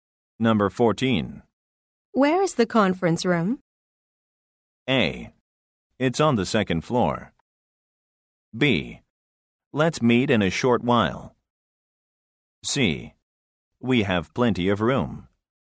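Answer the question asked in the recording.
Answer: A: It's on the second floor.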